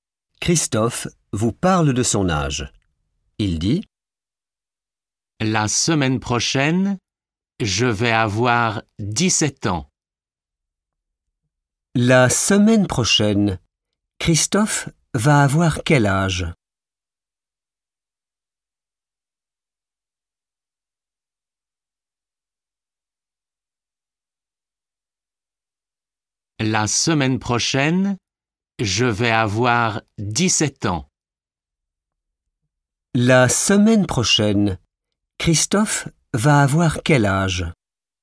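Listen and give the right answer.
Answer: 17 ans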